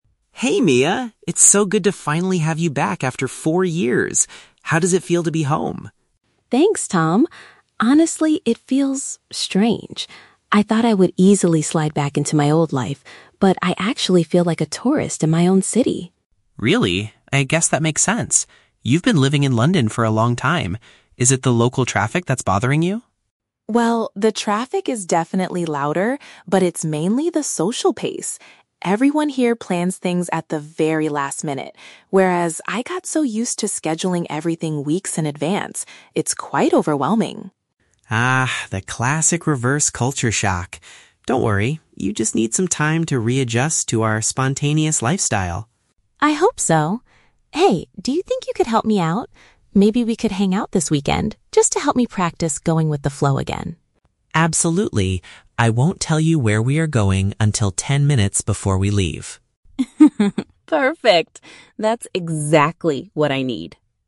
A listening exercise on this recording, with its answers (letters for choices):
Listen to the conversation between a returning student and her best friend. Choose the correct answer (A, B, or C) for each question.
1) How does Mia currently feel about returning to her hometown?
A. She feels entirely comfortable stepping back into her former routine.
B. She feels disconnected, as if she were a visitor exploring a new place.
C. She feels annoyed that her friends forgot about her while she was away.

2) What is the primary reason for Mia's difficulty in adjusting?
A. She finds the local transportation system to be too noisy and chaotic.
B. She struggles with the unexpected and unplanned nature of social events.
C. She has forgotten how to communicate smoothly in her native language.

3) How does Tom agree to help Mia this weekend?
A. By teaching her how to organize her personal schedule better.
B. By driving her around the city to help her get used to the traffic.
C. By taking her on an unannounced outing to practice being flexible.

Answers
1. B
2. B
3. C

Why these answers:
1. Mia states that she feels "like a tourist in my own city" (disconnected, like a visitor). Option (A) is a trap; she mentions that she thought she would "easily slide back into my old life," but the reality is different. Option (C) is not mentioned.
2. Mia explains that it's "mainly the social pace" because people plan things "at the very last minute" (unexpected and unplanned). Option (A) is a trap; Tom asks about the traffic, and Mia admits it is louder, but she clarifies that the social pace is her primary issue. Option (C) is never mentioned.
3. Mia asks Tom to help her practice "going with the flow" (being flexible), and Tom agrees by saying he "won't tell you where we are going until ten minutes before we leave" (an unannounced outing). Option (A) is a trap; Mia is already used to "scheduling everything weeks in advance," so she doesn't need help organizing. Option (B) is a trap related to the earlier distraction about traffic.

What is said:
Tom: Hey Mia! It's so good to finally have you back after four years! How does it feel to be home?
Mia: Thanks, Tom. Honestly, it feels... strange. I thought I would easily slide back into my old life, but I actually feel like a tourist in my own city.
Tom: Really? I guess that makes sense. You've been living in London for a long time. Is it the local traffic that's bothering you?
Mia: Well, the traffic is definitely louder, but it's mainly the social pace. Everyone here plans things at the very last minute, whereas I got so used to scheduling everything weeks in advance. It's quite overwhelming.
Tom: Ah, the classic reverse culture shock! Don't worry, you just need some time to readjust to our spontaneous lifestyle.
Mia: I hope so. Hey, do you think you could help me out? Maybe we could hang out this weekend, just to help me practice going with the flow again?
Tom: Absolutely! I won't tell you where we are going until ten minutes before we leave.
Mia: Perfect. That's exactly what I need.